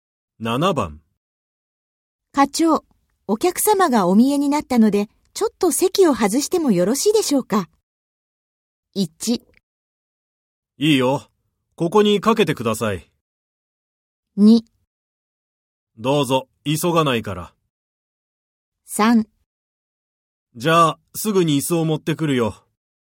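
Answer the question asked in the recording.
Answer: 2: どうぞ、急がないから。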